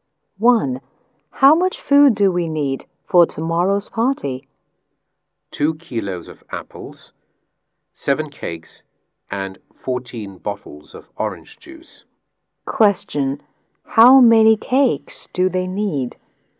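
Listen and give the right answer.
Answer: 7 cakes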